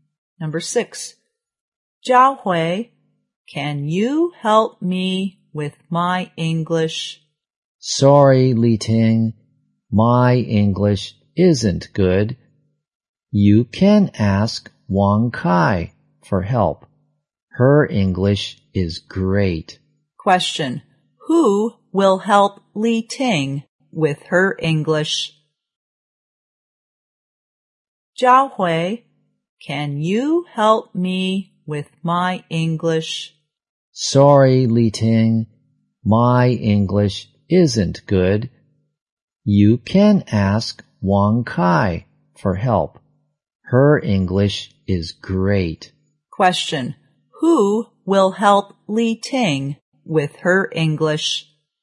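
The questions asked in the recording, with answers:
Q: who will help Li Ting with her English?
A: Wang Kai.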